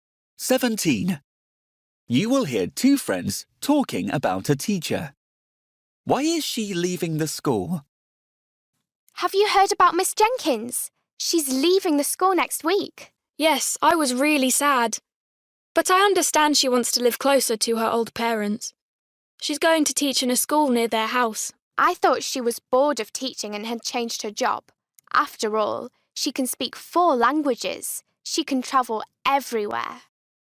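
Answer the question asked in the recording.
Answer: to live closer to her old parents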